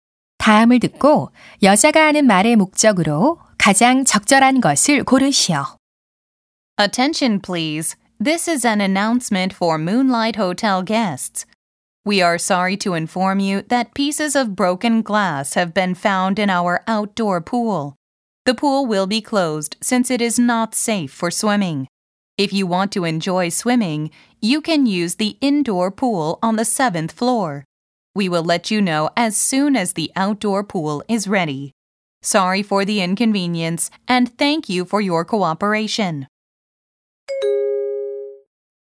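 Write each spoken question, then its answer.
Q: 다음을 듣고 여자가 하는 말의 목적으로 가장 적절한 것을 고르시오.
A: 야외 수영장이 폐쇄됨을 알리려고 (깨진 유리 때문에)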